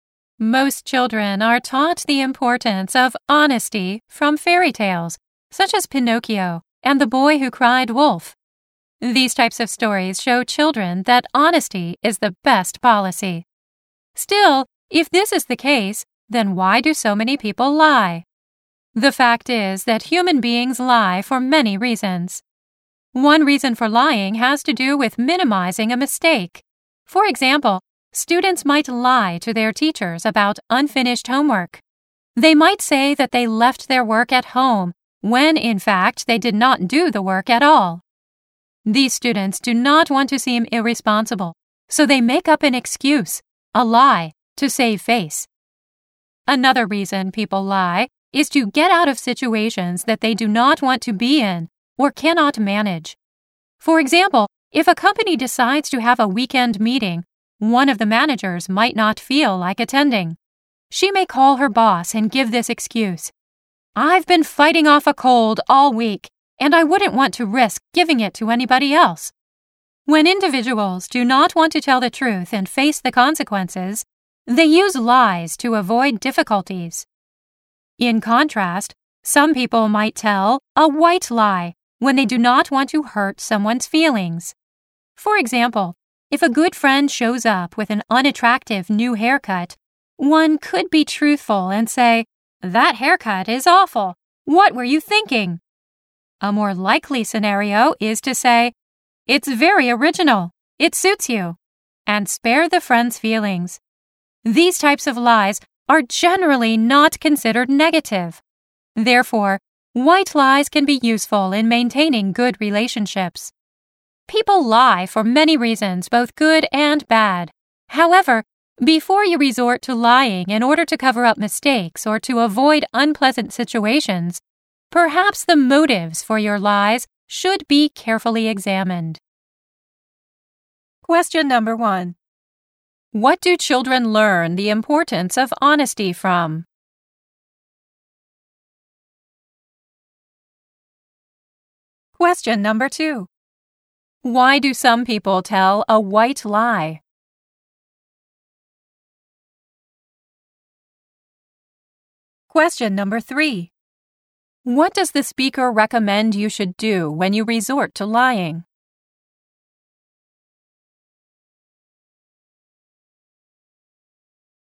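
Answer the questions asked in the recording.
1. From fairy tales, such as Pinocchio and the Boy Who Cried Wolf.
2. Because they do not want to hurt someone's feelings.
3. Carefully examine the motives for your lies.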